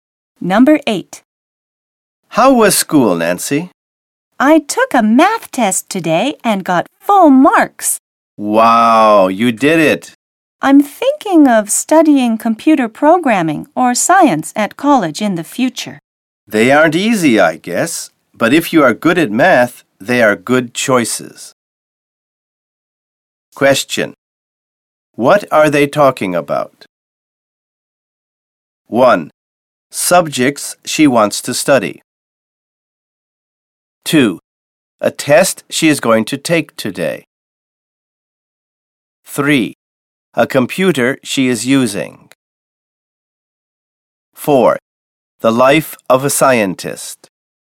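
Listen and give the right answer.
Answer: 1: Subjects she wants to study.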